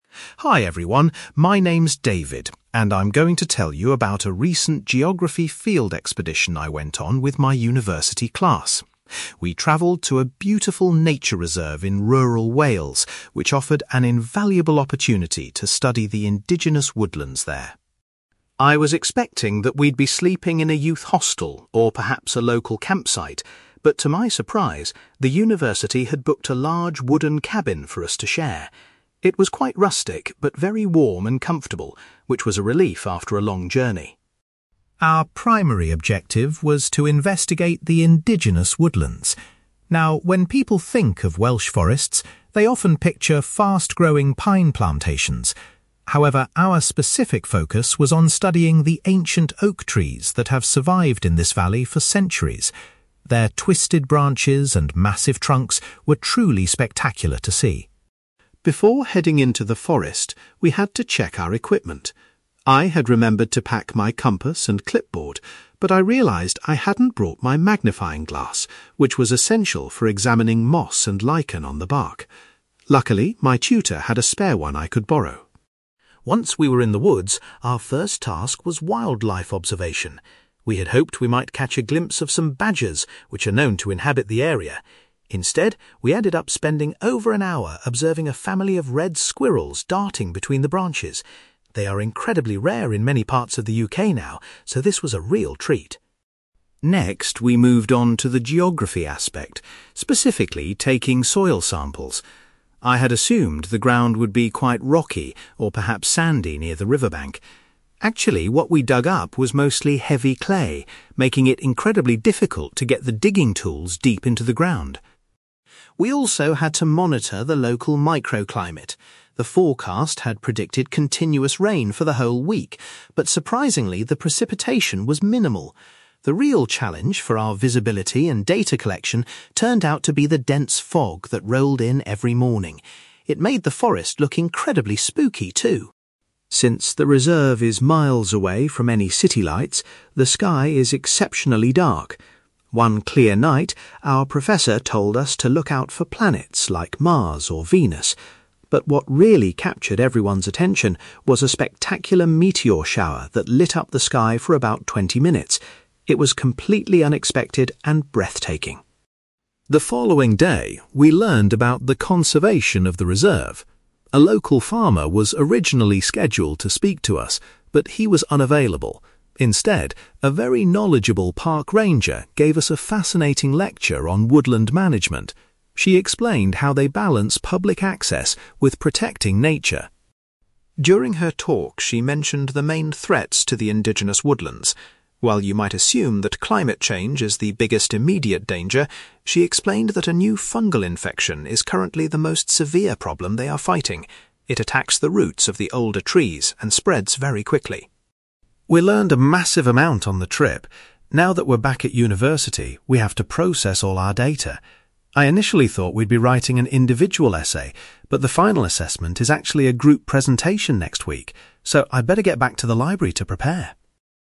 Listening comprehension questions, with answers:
For questions 9-18, complete the sentences with a word or short phrase.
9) David was surprised to find out that his accommodation for the trip was a (9)........................... .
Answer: wooden cabin

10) Rather than investigating pine forests, David's group focused on ancient (10)........................... .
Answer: oak trees

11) David had to borrow a (11)........................... from his teacher in order to look at plant life closely.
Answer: magnifying glass

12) David was delighted to spend a long time watching some (12)........................... in the forest.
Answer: red squirrels

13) David found it hard to use his tools because the earth was composed of (13)........................... .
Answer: heavy clay

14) David says that (14)........................... was the biggest weather problem they faced.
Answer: dense fog

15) The students were amazed to observe a (15)........................... in the night sky.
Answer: meteor shower

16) A talk on woodland management was delivered by a (16)........................... .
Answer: park ranger

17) The speaker learned that the main risk to the oldest trees currently comes from a (17)........................... .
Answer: fungal infection

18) David is currently busy preparing for a (18)........................... based on the expedition data.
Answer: group presentation

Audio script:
David: Hi everyone, my name's David, and I'm going to tell you about a recent geography field expedition I went on with my university class. We travelled to a beautiful nature reserve in rural Wales, which offered an invaluable opportunity to study the indigenous woodlands there.
I was expecting that we'd be sleeping in a youth hostel or perhaps a local campsite, but to my surprise, the university had booked a large wooden cabin for us to share. It was quite rustic, but very warm and comfortable, which was a relief after a long journey.
Our primary objective was to investigate the indigenous woodlands. Now, when people think of Welsh forests, they often picture fast-growing pine plantations. However, our specific focus was on studying the ancient oak trees that have survived in this valley for centuries. Their twisted branches and massive trunks were truly spectacular to see.
Before heading into the forest, we had to check our equipment. I had remembered to pack my compass and clipboard, but I realised I hadn't brought my magnifying glass, which was essential for examining moss and lichen on the bark. Luckily, my tutor had a spare one I could borrow.
Once we were in the woods, our first task was wildlife observation. We had hoped we might catch a glimpse of some badgers, which are known to inhabit the area. Instead, we ended up spending over an hour observing a family of red squirrels darting between the branches. They are incredibly rare in many parts of the UK now, so this was a real treat.
Next, we moved on to the geography aspect, specifically taking soil samples. I had assumed the ground would be quite rocky or perhaps sandy near the riverbank. Actually, what we dug up was mostly heavy clay, making it incredibly difficult to get the digging tools deep into the ground.
We also had to monitor the local microclimate. The forecast had predicted continuous rain for the whole week, but surprisingly, the precipitation was minimal. The real challenge for our visibility and data collection turned out to be the dense fog that rolled in every morning. It made the forest look incredibly spooky, too!
Since the reserve is miles away from any city lights, the sky is exceptionally dark. One clear night, our professor told us to look out for planets like Mars or Venus. But what really captured everyone's attention was a spectacular meteor shower that lit up the sky for about twenty minutes. It was completely unexpected and breathtaking.
The following day, we learned about the conservation of the reserve. A local farmer was originally scheduled to speak to us, but he was unavailable. Instead, a very knowledgeable park ranger gave us a fascinating lecture on woodland management. She explained how they balance public access with protecting nature.
During her talk, she mentioned the main threats to the indigenous woodlands. While you might assume that climate change is the biggest immediate danger, she explained that a new fungal infection is currently the most severe problem they are fighting. It attacks the roots of the older trees and spreads very quickly.
We learned a massive amount on the trip. Now that we're back at university, we have to process all our data. I initially thought we'd be writing an individual essay, but the final assessment is actually a group presentation next week. So, I'd better get back to the library to prepare!

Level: B2